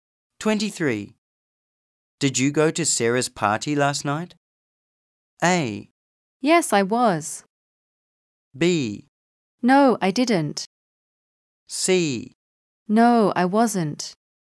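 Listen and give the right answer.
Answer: B: No, I didn't.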